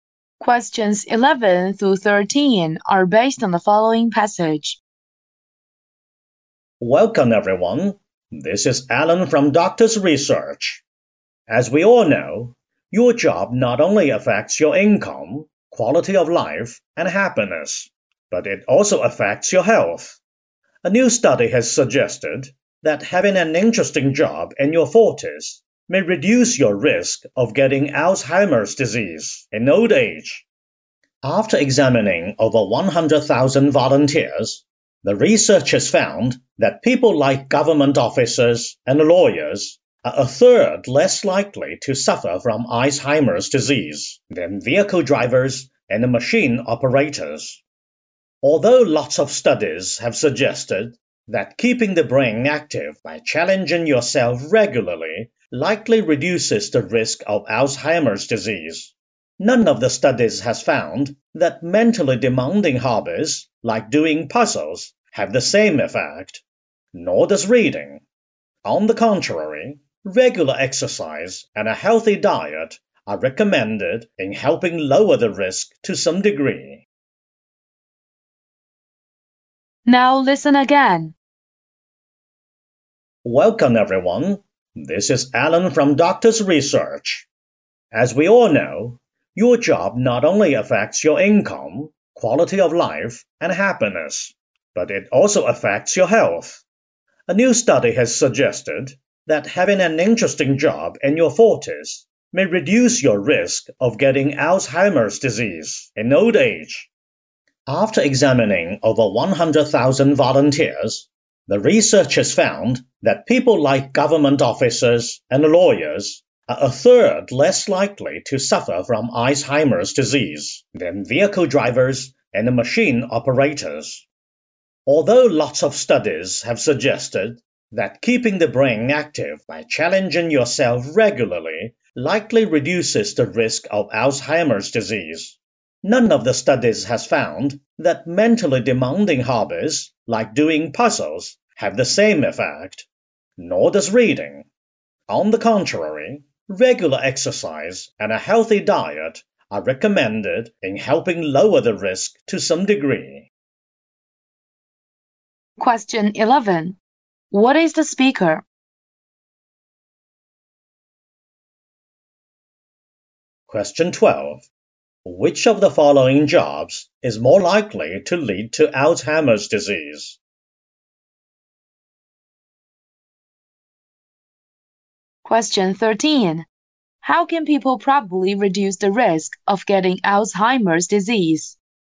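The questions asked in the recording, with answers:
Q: How can people probably reduce the risk of getting Alzheimer's disease?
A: By exercising regularly and eating a healthy diet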